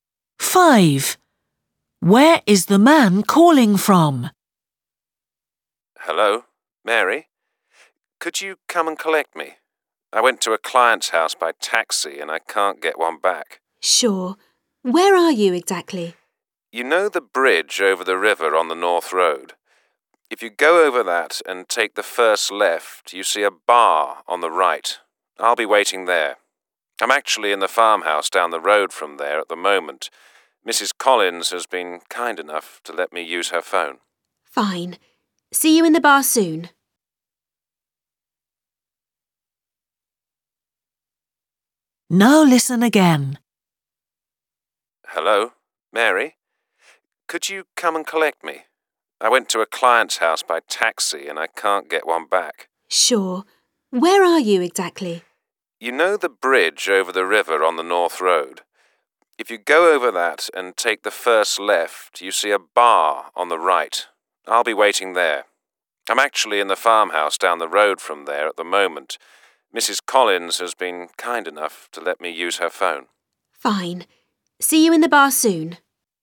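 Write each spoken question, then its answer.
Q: Where is the man calling from?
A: A farmhouse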